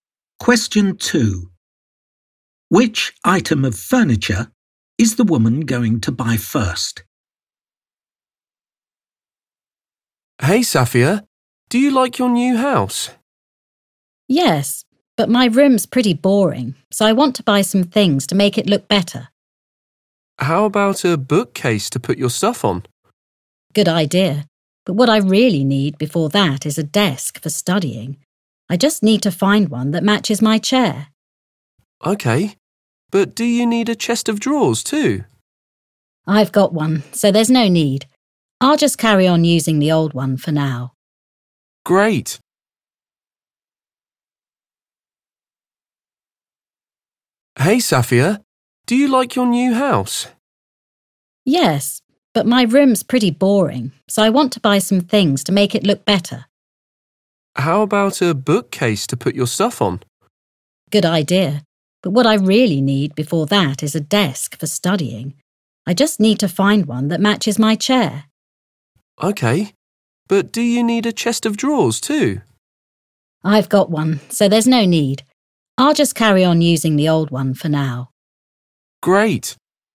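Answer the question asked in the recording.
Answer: a desk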